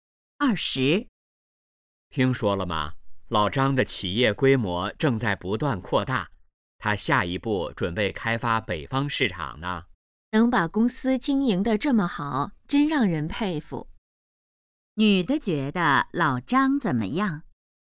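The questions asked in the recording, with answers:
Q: 女的觉得老张怎么样?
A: 让人佩服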